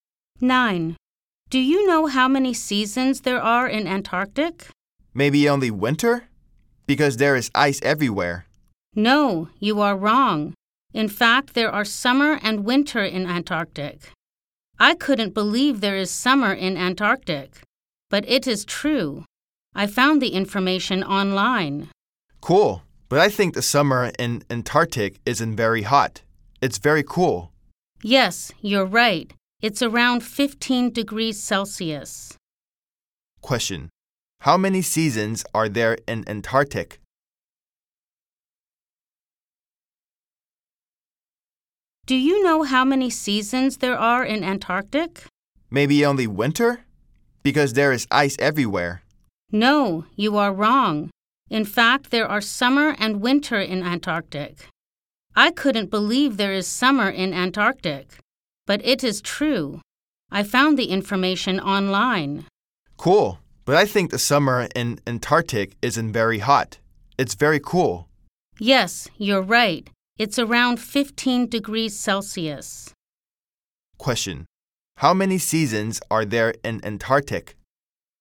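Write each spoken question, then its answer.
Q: How many seasons are there in Antarctica?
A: Two: summer and winter.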